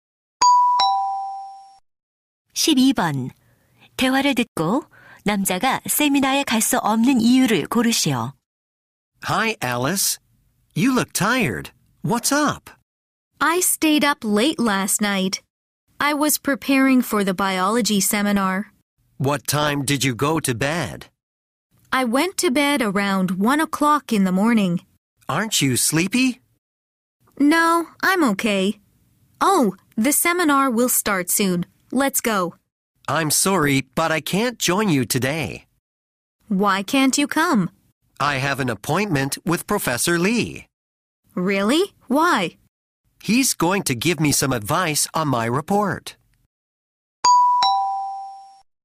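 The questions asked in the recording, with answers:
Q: 대화를 듣고 남자가 세미나에 갈 수 없는 이유를 고르시오.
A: 리 교수님과 약속이 있어서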